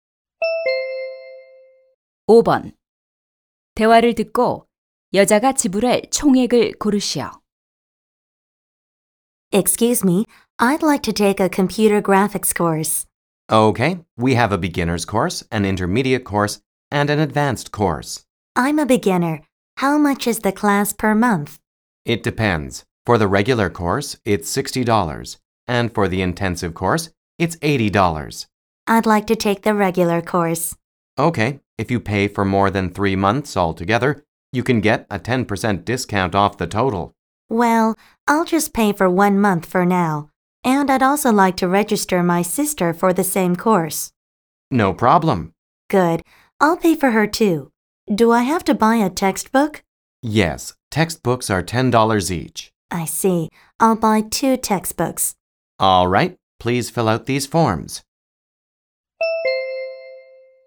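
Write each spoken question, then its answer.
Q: 대화를 듣고 여자가 지불할 총액을 고르시오.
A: 140달러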